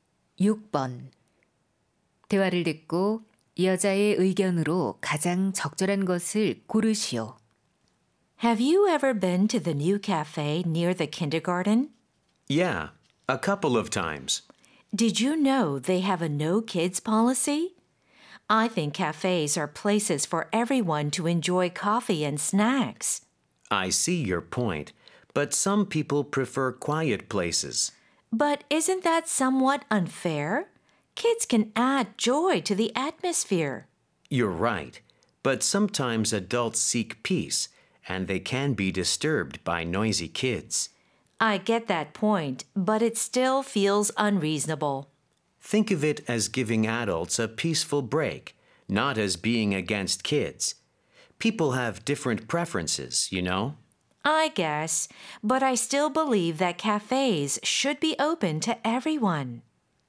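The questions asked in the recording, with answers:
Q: 대화를 듣고 여자의 의견으로 가장 적절한 것을 고르시오.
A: 카페는 모든 사람(아이 포함)에게 열려 있어야 한다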